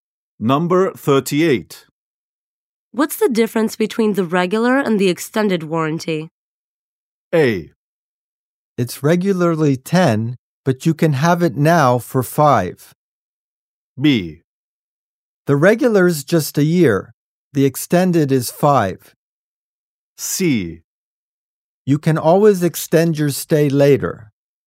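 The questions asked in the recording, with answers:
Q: What's the difference between the regular and the extended warranty?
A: B: The regular's just a year. The extended is 5.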